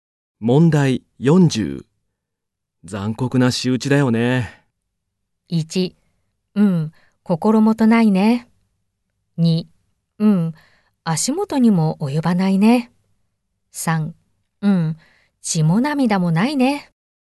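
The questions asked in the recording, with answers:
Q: 残酷な仕打ちだよね。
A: 3: うん、血も涙もないね。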